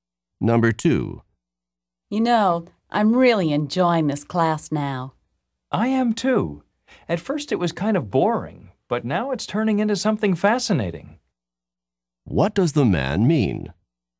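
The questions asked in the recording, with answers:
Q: What does the man mean?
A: The class has become fascinating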